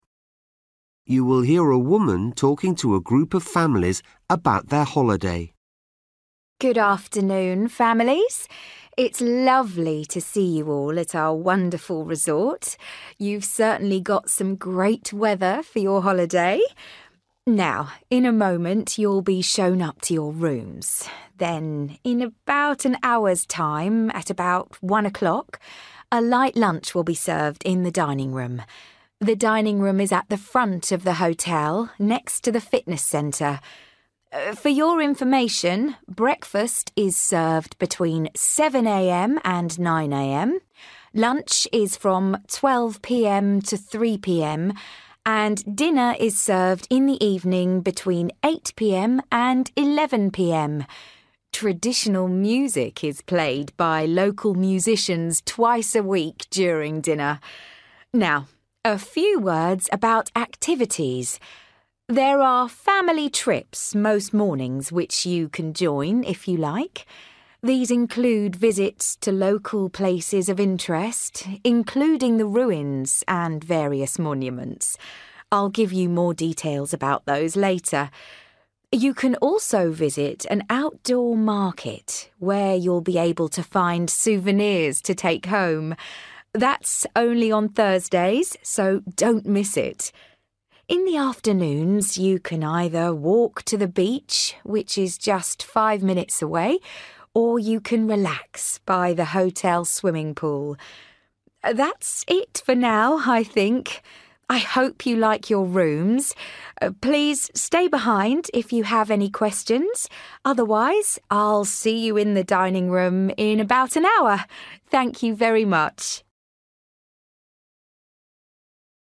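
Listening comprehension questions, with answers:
For each question, write the correct answer in the gap. Write one or two words or a number or a date or a time. You will hear a woman talking to a group of families about their holiday.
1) Meals will be served in the dining room which is located at the (1) of the hotel.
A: front

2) Breakfast (2) a.m. - 9 a.m.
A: 7

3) Dinner 8 p.m. - 11 p.m. (includes traditional (3) twice a week)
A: music

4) Trips include visits to (4) ruins and monuments.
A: local

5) Visit to an outdoor market every (5)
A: Thursday

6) Visit the beach (only (6) away)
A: 5 minutes

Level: Luyện nghe trình độ B1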